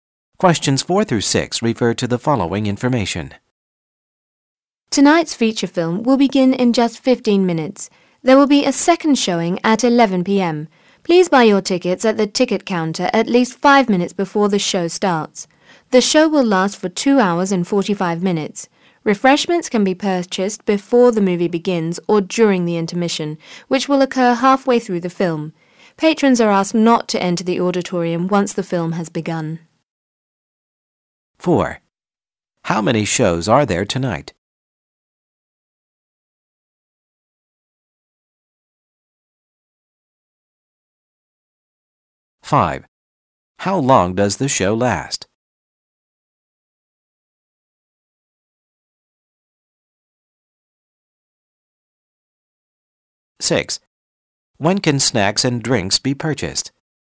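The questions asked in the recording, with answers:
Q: How many shows are there tonight?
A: Two

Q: How long does the show last?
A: 2 hours and 45 minutes

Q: When can snacks and drinks be purchased?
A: Before the movie begins or during the intermission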